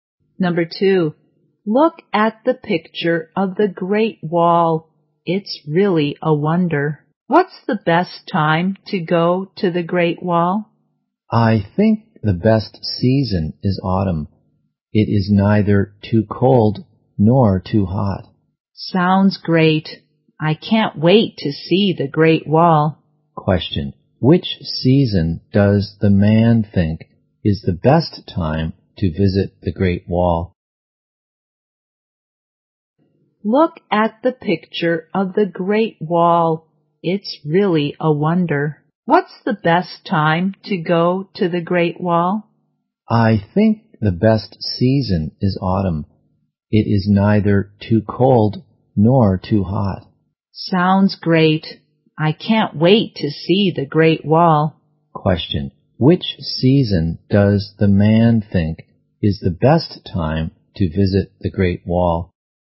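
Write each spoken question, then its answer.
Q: which season does the man think is the best time to visit the Great Wall?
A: Autumn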